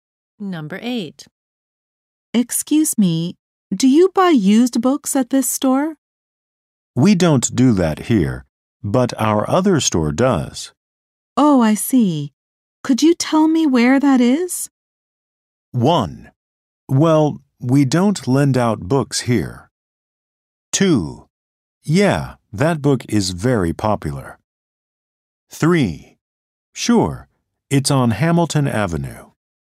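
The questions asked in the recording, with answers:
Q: Oh, I see. Could you tell me where that is?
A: 3: Sure, it's on Hamilton Avenue.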